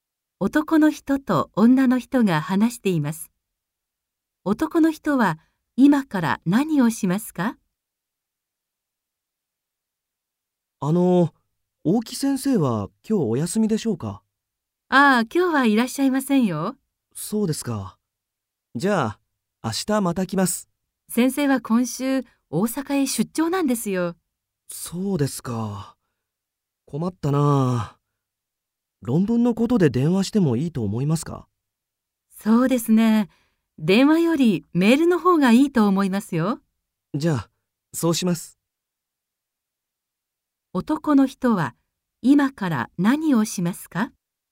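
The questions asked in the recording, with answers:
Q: 男の人は今から何をしますか?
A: 先生にメールを送る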